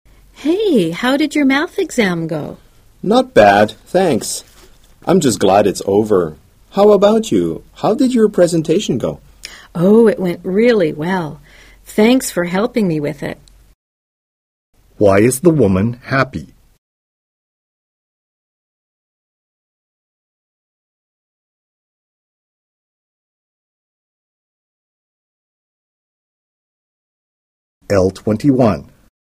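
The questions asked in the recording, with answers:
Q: Why is the woman happy?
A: Her presentation went really well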